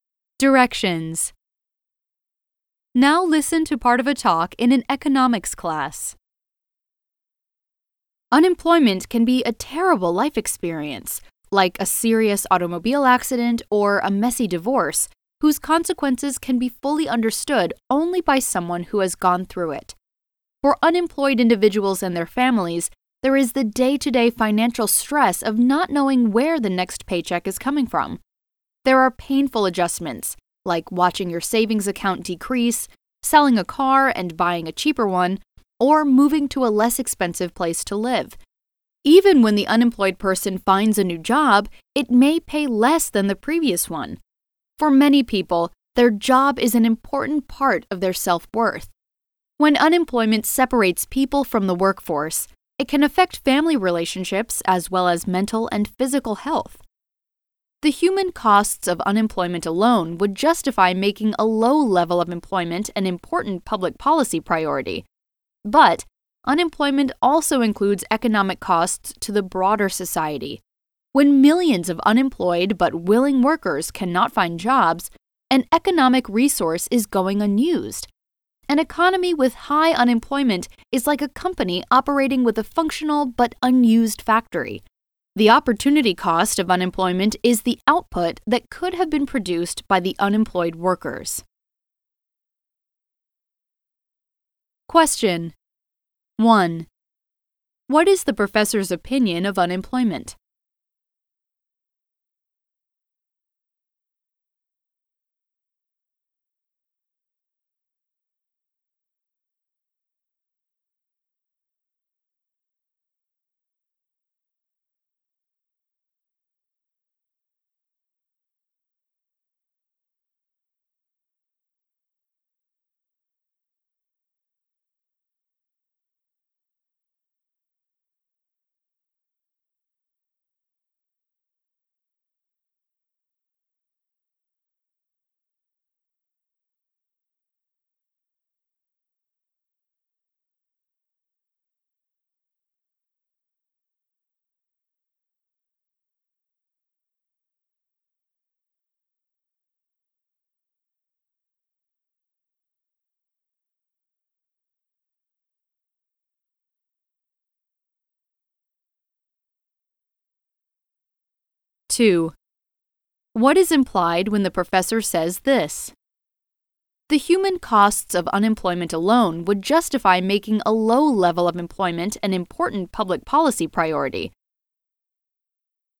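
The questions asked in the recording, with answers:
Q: What is the professor's opinion of unemployment?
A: It is a terrible experience, with serious human and economic costs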